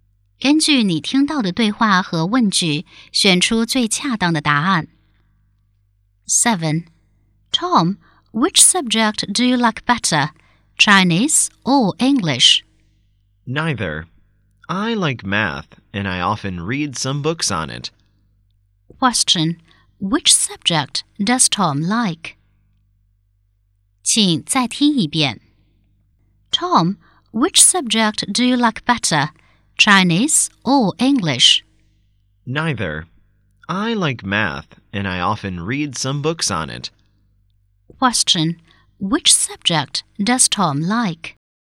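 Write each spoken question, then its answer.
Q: Which subject does Tom like?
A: Math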